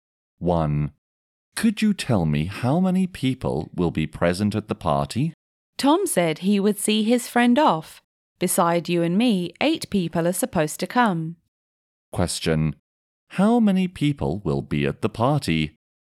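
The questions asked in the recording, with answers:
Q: How many people will be at the party?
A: 10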